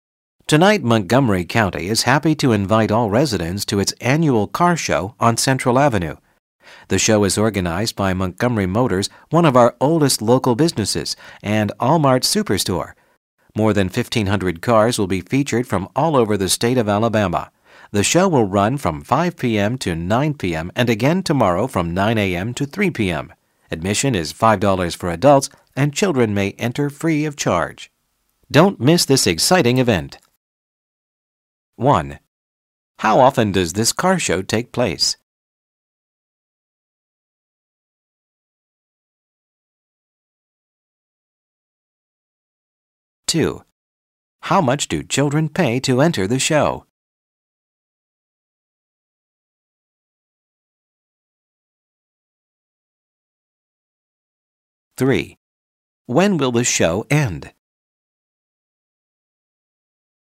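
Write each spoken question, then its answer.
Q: How often does this car show take place?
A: Once a year

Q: How much do children pay to enter the show?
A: Nothing; it's free

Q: When will the show end?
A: Tomorrow at 3 p.m.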